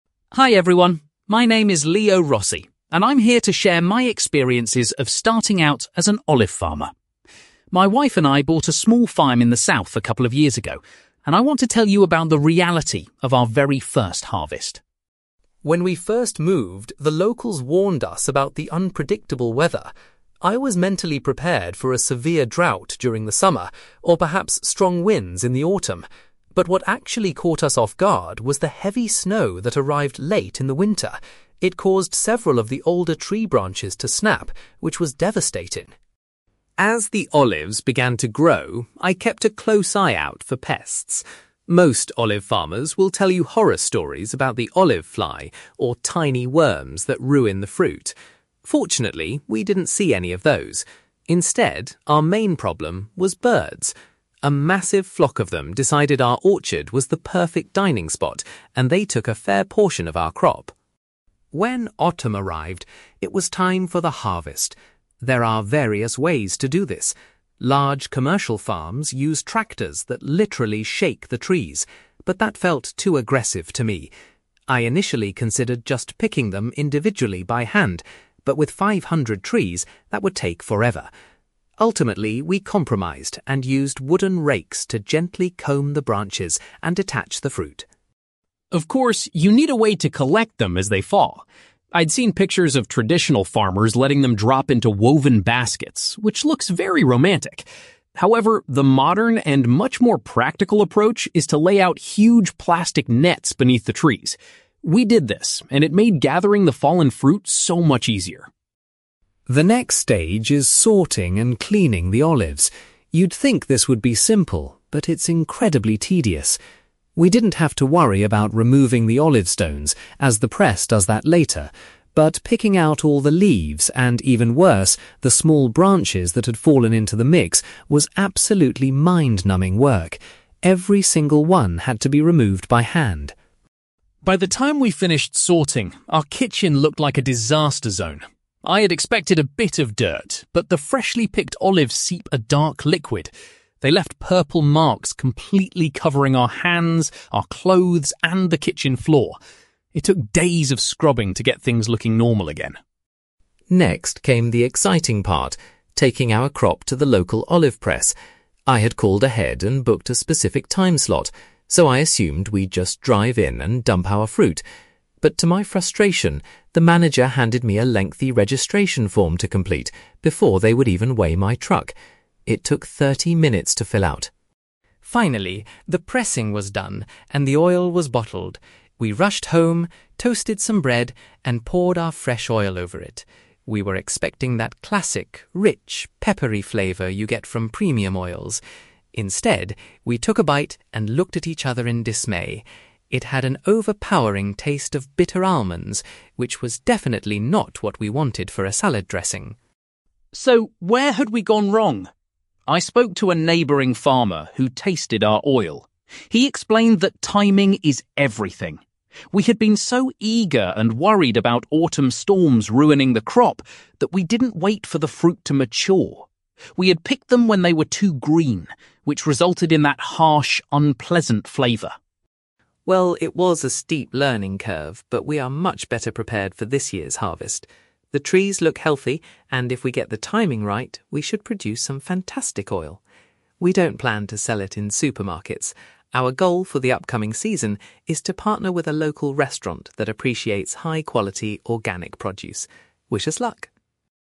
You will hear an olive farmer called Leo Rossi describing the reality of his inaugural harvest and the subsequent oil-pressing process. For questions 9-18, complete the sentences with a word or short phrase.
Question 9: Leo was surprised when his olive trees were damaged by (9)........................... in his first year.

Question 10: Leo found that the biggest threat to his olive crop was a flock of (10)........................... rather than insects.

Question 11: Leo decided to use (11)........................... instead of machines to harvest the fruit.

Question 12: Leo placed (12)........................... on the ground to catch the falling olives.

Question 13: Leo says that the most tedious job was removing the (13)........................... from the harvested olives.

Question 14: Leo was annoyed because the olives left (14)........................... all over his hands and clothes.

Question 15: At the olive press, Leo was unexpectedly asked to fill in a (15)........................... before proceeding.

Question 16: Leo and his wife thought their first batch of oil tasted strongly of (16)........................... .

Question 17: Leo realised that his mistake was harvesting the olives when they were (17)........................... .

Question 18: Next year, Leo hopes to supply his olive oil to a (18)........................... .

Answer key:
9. heavy snow
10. birds
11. wooden rakes
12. plastic nets
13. small branches
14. purple marks
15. registration form
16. bitter almonds
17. too green
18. local restaurant

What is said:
Leo Rossi: Hi everyone, my name is Leo Rossi, and I'm here to share my experiences of starting out as an olive farmer. My wife and I bought a small farm in the south a couple of years ago, and I want to tell you about the reality of our very first harvest.
When we first moved, the locals warned us about the unpredictable weather. I was mentally prepared for a severe drought during the summer, or perhaps strong winds in the autumn. But what actually caught us off guard was the heavy snow that arrived late in the winter. It caused several of the older tree branches to snap, which was devastating.
As the olives began to grow, I kept a close eye out for pests. Most olive farmers will tell you horror stories about the olive fly, or tiny worms that ruin the fruit. Fortunately, we didn't see any of those. Instead, our main problem was birds. A massive flock of them decided our orchard was the perfect dining spot, and they took a fair portion of our crop!
When autumn arrived, it was time for the harvest. There are various ways to do this. Large commercial farms use tractors that literally shake the trees, but that felt too aggressive to me. I initially considered just picking them individually by hand, but with five hundred trees, that would take forever. Ultimately, we compromised and used wooden rakes to gently comb the branches and detach the fruit.
Of course, you need a way to collect them as they fall. I'd seen pictures of traditional farmers letting them drop into woven baskets, which looks very romantic. However, the modern and much more practical approach is to lay out huge plastic nets beneath the trees. We did this, and it made gathering the fallen fruit so much easier.
The next stage is sorting and cleaning the olives. You'd think this would be simple, but it's incredibly tedious. We didn't have to worry about removing the olive stones, as the press does that later. But picking out all the leaves and, even worse, the small branches that had fallen into the mix was absolutely mind-numbing work. Every single one had to be removed by hand.
By the time we finished sorting, our kitchen looked like a disaster zone. I had expected a bit of dirt, but the freshly picked olives seep a dark liquid. They left purple marks completely covering our hands, our clothes, and the kitchen floor. It took days of scrubbing to get things looking normal again.
Next came the exciting part: taking our crop to the local olive press. I had called ahead and booked a specific time slot, so I assumed we'd just drive in and dump our fruit. But to my frustration, the manager handed me a lengthy registration form to complete before they would even weigh my truck. It took thirty minutes to fill out!
Finally, the pressing was done and the oil was bottled. We rushed home, toasted some bread, and poured our fresh oil over it. We were expecting that classic, rich, peppery flavour you get from premium oils. Instead, we took a bite and looked at each other in dismay. It had an overpowering taste of bitter almonds, which was definitely not what we wanted for a salad dressing!
So, where had we gone wrong? I spoke to a neighbouring farmer who tasted our oil. He explained that timing is everything. We had been so eager and worried about autumn storms ruining the crop that we didn't wait for the fruit to mature. We had picked them when they were too green, which resulted in that harsh, unpleasant flavour.
Well, it was a steep learning curve, but we are much better prepared for this year's harvest. The trees look healthy, and if we get the timing right, we should produce some fantastic oil. We don't plan to sell it in supermarkets. Our goal for the upcoming season is to partner with a local restaurant that appreciates high-quality, organic produce. Wish us luck!

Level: B2 English Listening Exercise